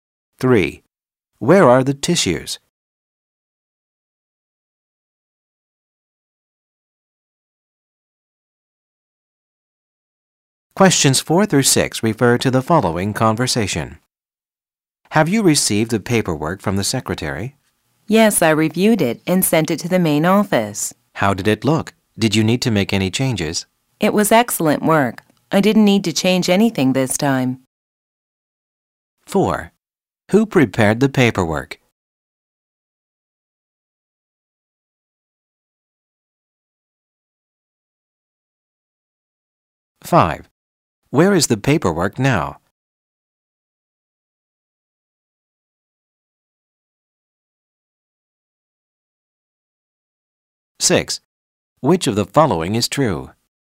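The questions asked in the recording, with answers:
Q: Who prepared the paperwork?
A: The secretary

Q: Where is the paperwork now?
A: At the main office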